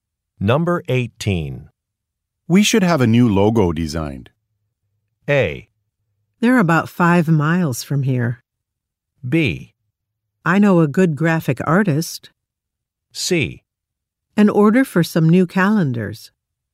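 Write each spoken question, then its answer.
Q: We should have a new logo designed.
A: B: I know a good graphic artist.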